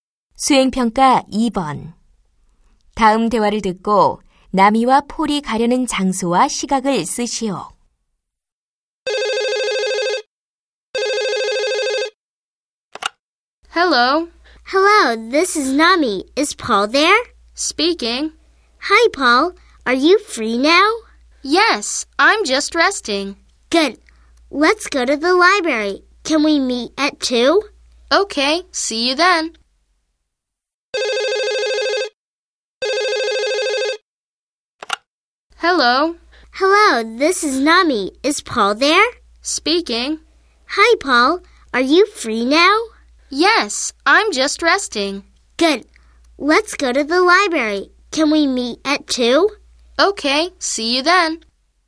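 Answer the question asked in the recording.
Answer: 도서관, 2시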